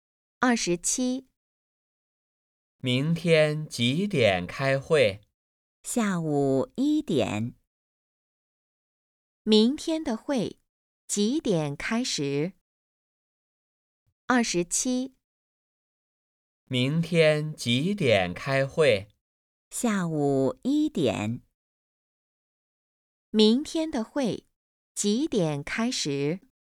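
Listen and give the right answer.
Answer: 下午1点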